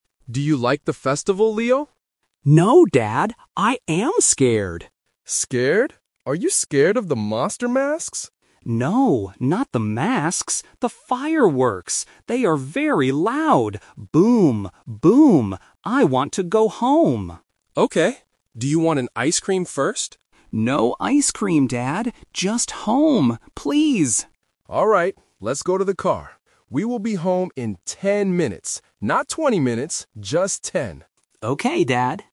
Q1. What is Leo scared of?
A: The fireworks

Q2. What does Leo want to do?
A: Go home

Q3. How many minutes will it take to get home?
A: 10 minutes

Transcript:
Dad: Do you like the festival, Leo?
Leo: No, Dad. I am scared!
Dad: Scared? Are you scared of the monster masks?
Leo: No, not the masks. They are very loud. Boom, boom! I want to go home.
Dad: Okay. Do you want an ice cream first?
Leo: No ice cream, Dad. Just home. Please!
Let's go to the car. We will be home in 10 minutes. Not 20 minutes. Just 10.

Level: A1